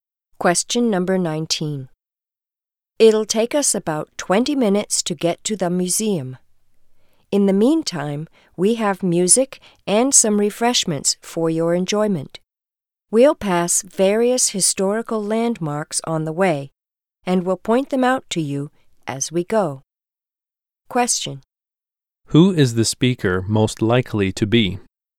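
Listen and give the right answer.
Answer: A tour guide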